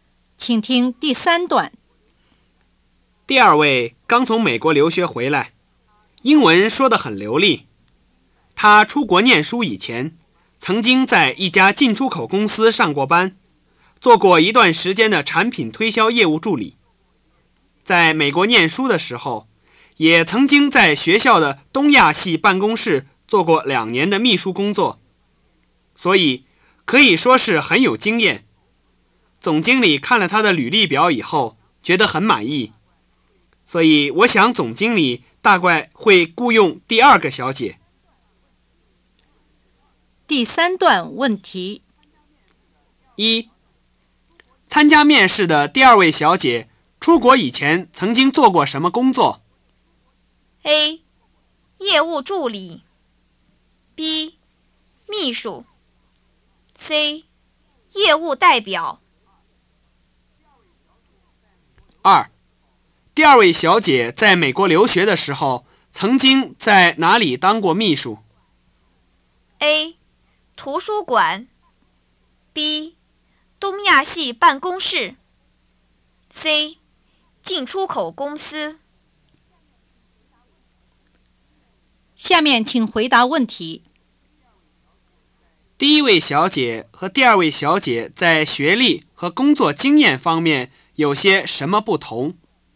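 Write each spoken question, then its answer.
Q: 参加面试的第二位小姐出国以前曾经做过什么工作?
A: A: 业务助理

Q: 第二位小姐在美国留学的时候曾经在哪里当过秘书?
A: B: 东亚系办公室

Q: 第一位小姐和第二位小姐在学历和工作经验方面有些什么不同?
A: 第一位主修经济、刚从大学毕业,没有工作经验;第二位在美国留学,做过业务助理和两年秘书,很有经验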